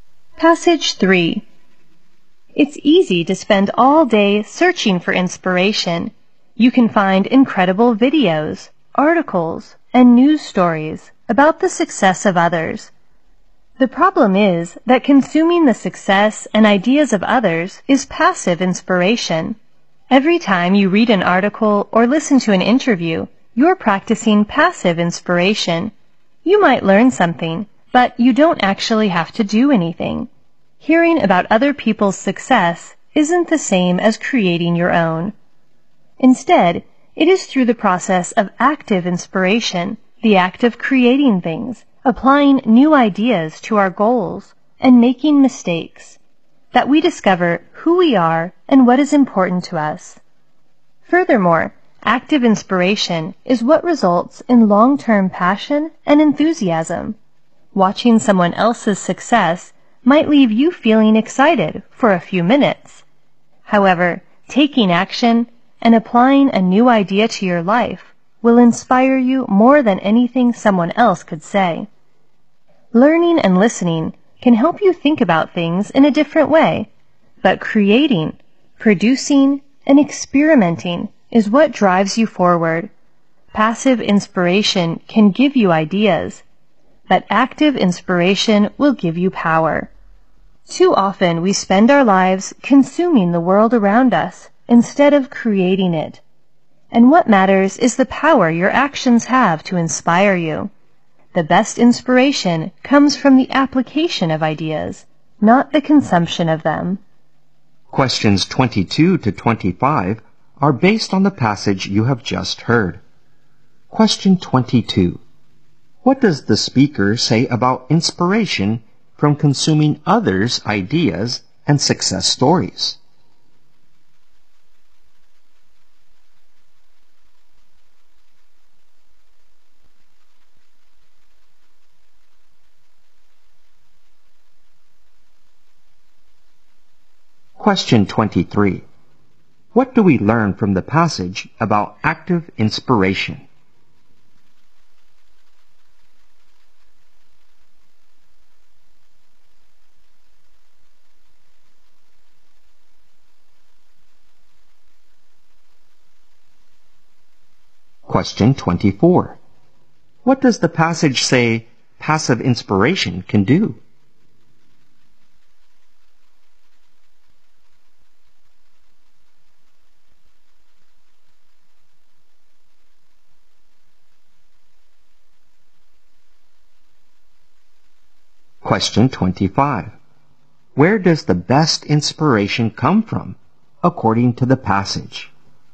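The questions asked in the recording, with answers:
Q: What does the passage say passive inspiration can do?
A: Give you ideas

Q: Where does the best inspiration come from, according to the passage?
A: The application of ideas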